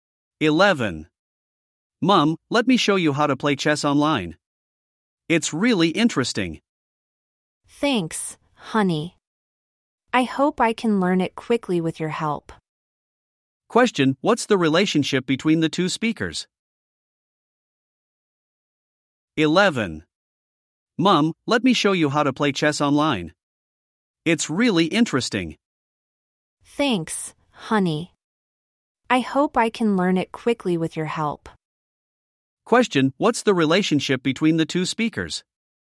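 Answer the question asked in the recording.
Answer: Mother and child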